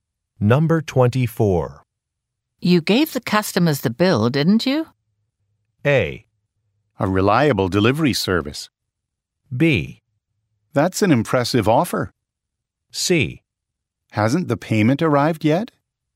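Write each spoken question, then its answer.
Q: You gave the customers the bill, didn't you?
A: C: Hasn't the payment arrived yet?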